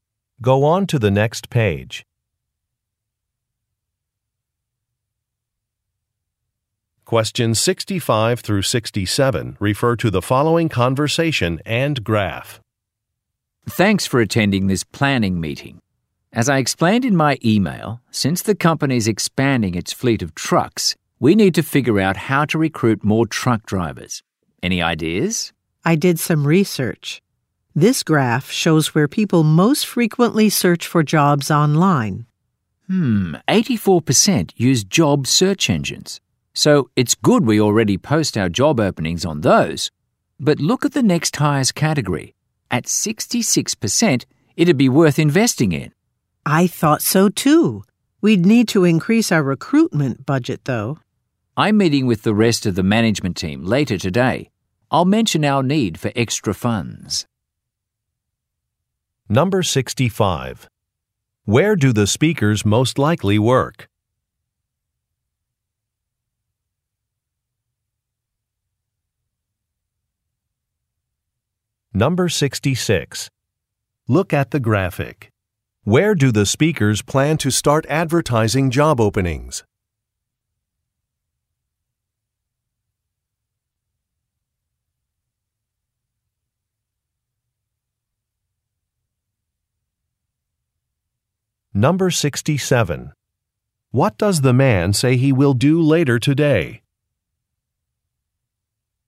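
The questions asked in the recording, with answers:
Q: Where do the speakers most likely work?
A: At a trucking company

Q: What does the man say he will do later today?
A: Ask the management team for extra recruitment funds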